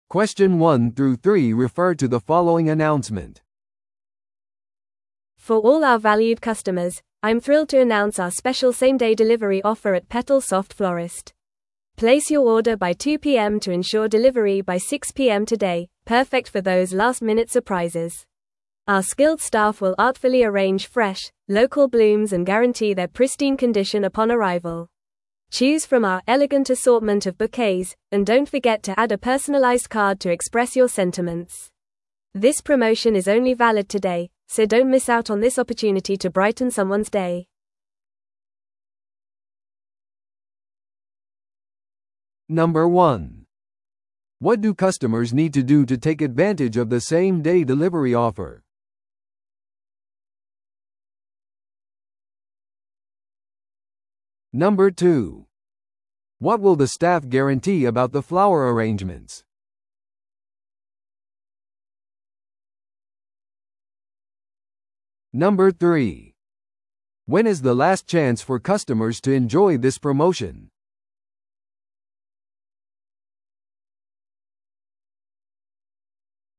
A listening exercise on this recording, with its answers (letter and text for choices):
Listen to the audio below and answer the questions.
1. What do customers need to do to take advantage of the same-day delivery offer?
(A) 午後2時までに注文する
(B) 店舗でピックアップする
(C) サービスに申し込む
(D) 特別包装を要求する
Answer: (A) 午後2時までに注文する

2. What will the staff guarantee about the flower arrangements?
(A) 割引価格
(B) 1時間以内の配達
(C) 到着時の美しい状態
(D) 1年間の保証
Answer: (C) 到着時の美しい状態

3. When is the last chance for customers to enjoy this promotion?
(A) 1週間以内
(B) 来月まで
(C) 2営業日以内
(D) 今日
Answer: (D) 今日

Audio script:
For all our valued customers, I'm thrilled to announce our special same-day delivery offer at PetalSoft Florist. Place your order by 2pm to ensure delivery by 6pm today, perfect for those last-minute surprises. Our skilled staff will artfully arrange fresh, local blooms and guarantee their pristine condition upon arrival. Choose from our elegant assortment of bouquets, and don't forget to add a personalized card to express your sentiments. This promotion is only valid today, so don't miss out on this opportunity to brighten someone's day!